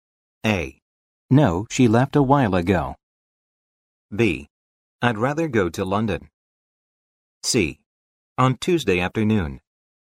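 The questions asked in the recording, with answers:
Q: When will you take off for Paris?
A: C: On Tuesday afternoon.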